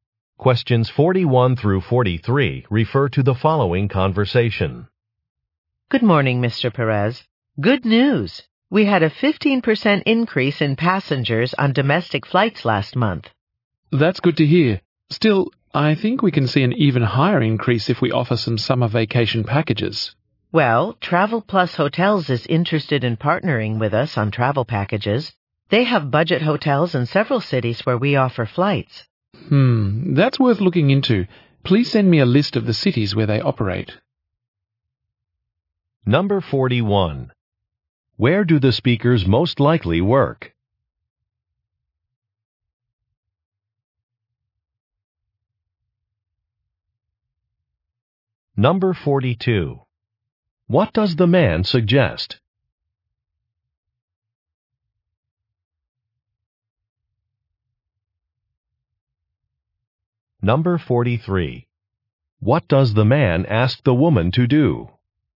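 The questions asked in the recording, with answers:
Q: Where do the speakers most likely work?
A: At an airline

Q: What does the man suggest?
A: Offering summer vacation packages

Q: What does the man ask the woman to do?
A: Send a list of cities where Travel Plus Hotels operates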